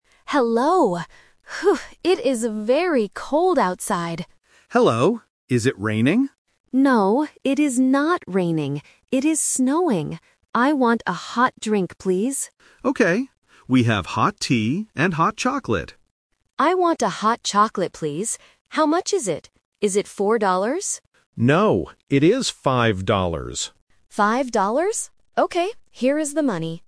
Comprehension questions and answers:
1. What is the weather like outside?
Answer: Snowing

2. What does the customer want to drink?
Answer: Hot chocolate

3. How much is the drink?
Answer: 5 dollars